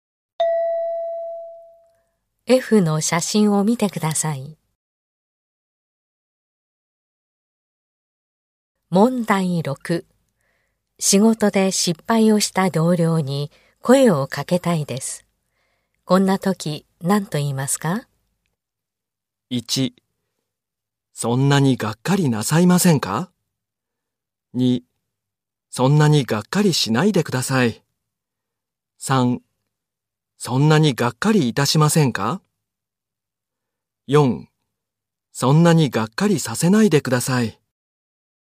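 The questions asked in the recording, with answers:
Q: 仕事で失敗をした同僚に声をかけたいです。こんな時何と言いますか?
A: 2: そんなにがっかりしないでください。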